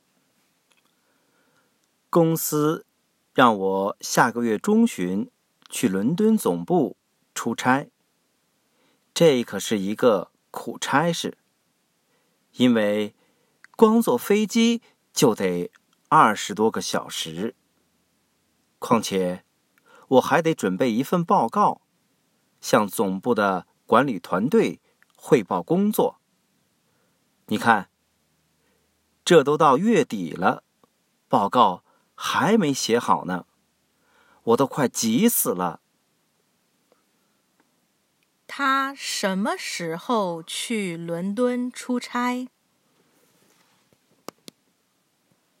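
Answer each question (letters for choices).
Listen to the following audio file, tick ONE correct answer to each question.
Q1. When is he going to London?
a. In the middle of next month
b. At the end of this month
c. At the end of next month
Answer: a

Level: Advanced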